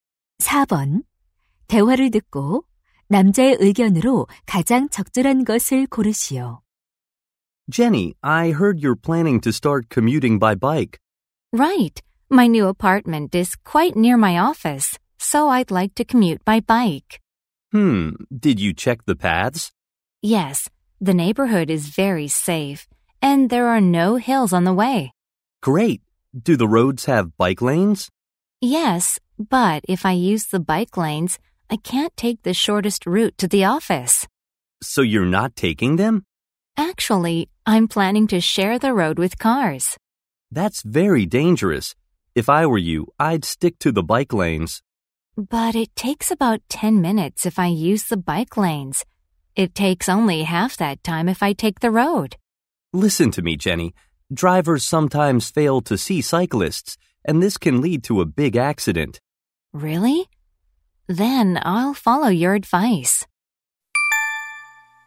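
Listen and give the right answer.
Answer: 자전거로 출퇴근할 때는 자전거 전용 도로를 이용해야 한다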